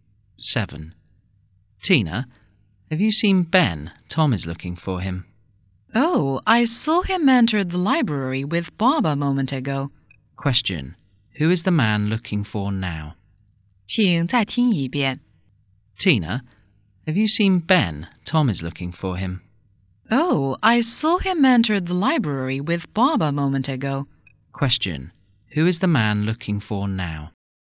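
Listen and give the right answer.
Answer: Ben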